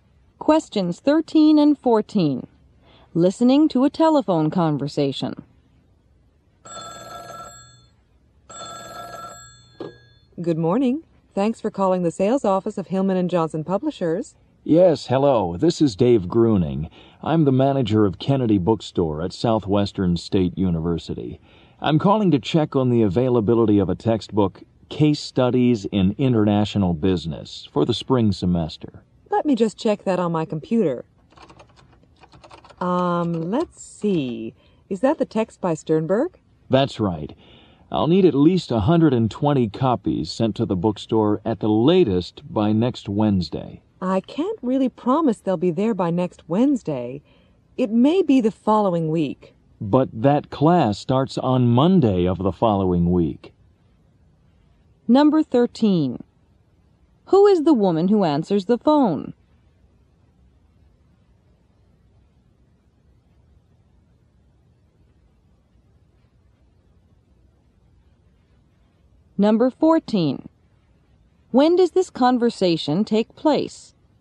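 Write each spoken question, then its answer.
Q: Who is the woman who answers the phone?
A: An employee in the sales office of Hillman & Johnson Publishers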